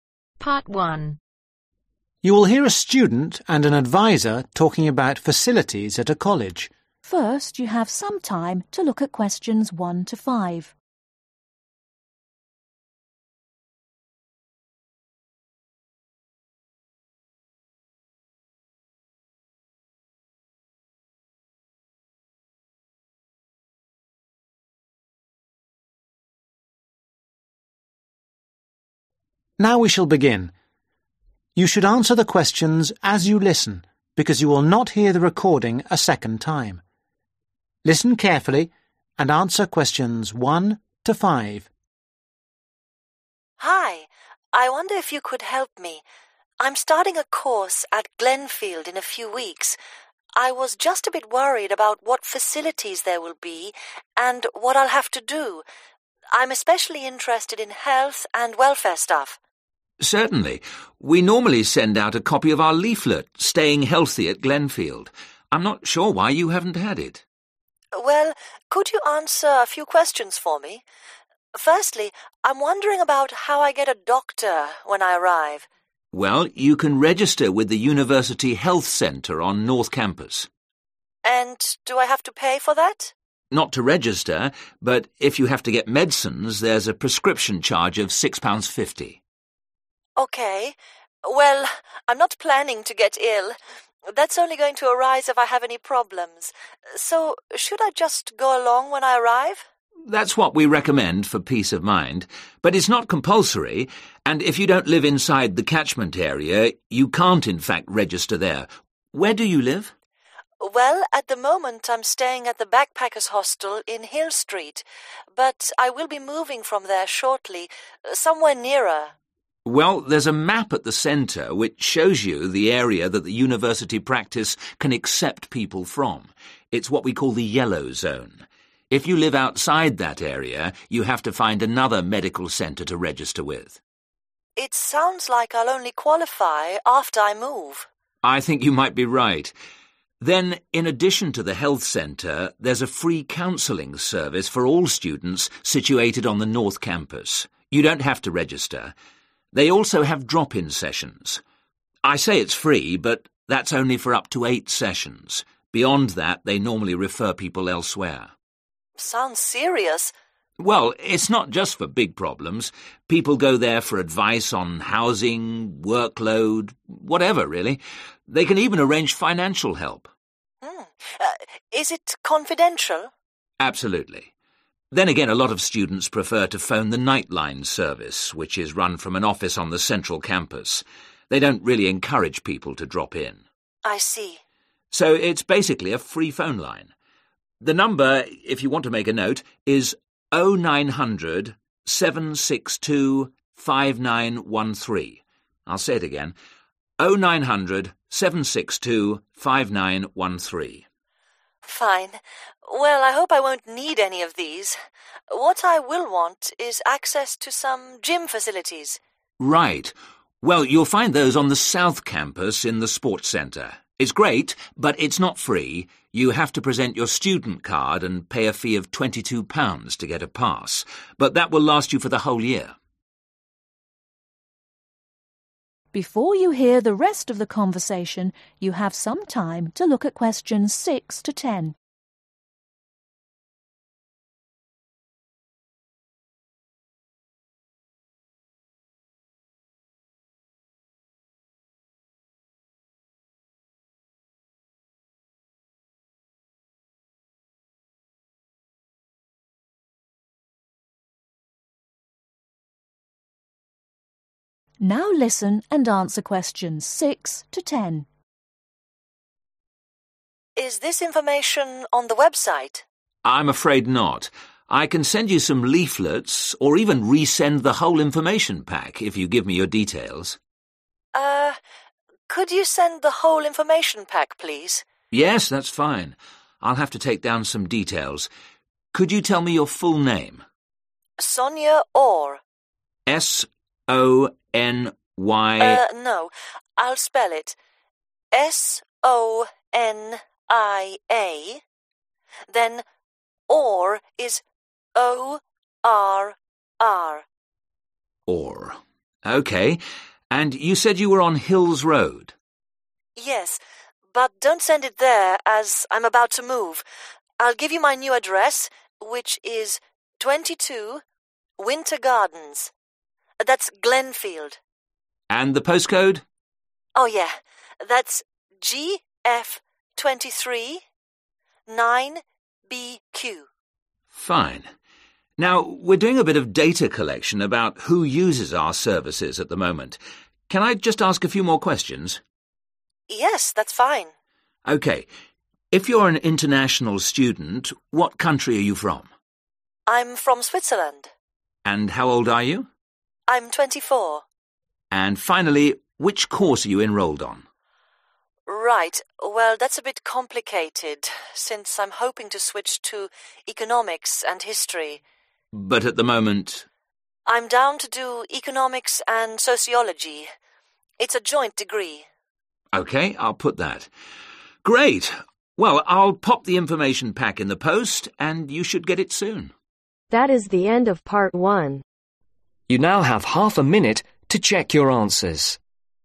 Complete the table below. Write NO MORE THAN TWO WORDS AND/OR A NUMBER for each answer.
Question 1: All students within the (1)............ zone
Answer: Yellow

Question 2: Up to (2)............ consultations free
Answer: 8/Eight

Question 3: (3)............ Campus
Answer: Central

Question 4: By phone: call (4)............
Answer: 09007625913

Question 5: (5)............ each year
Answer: £22

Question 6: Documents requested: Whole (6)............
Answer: Information pack

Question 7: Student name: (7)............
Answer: Sonia Orr

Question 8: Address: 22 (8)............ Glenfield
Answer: Winter Gardens

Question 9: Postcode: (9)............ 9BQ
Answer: GF23

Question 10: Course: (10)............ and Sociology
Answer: Economics